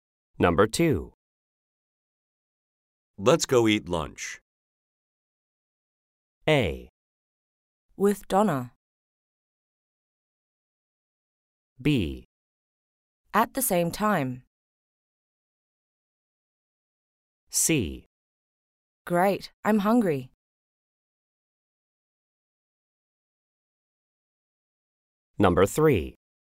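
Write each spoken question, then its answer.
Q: Let's go eat lunch.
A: C: Great, I'm hungry.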